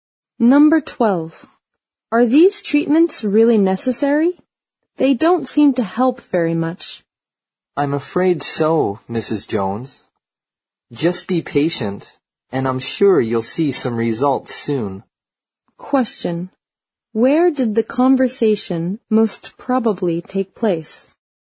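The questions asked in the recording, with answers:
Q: Where did the conversation most probably take place?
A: At a doctor's office or hospital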